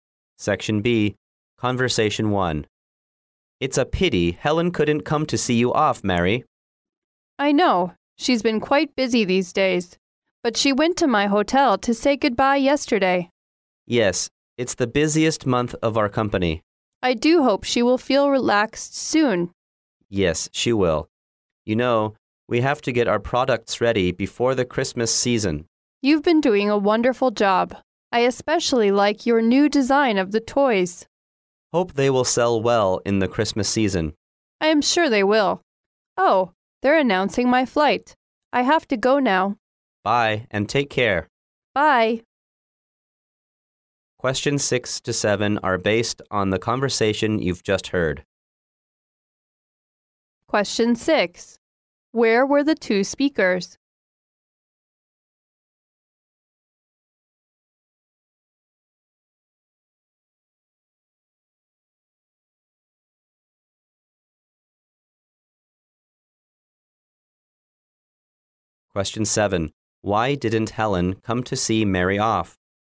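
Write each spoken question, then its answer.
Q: Why didn't Helen come to see Mary off?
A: She was very busy.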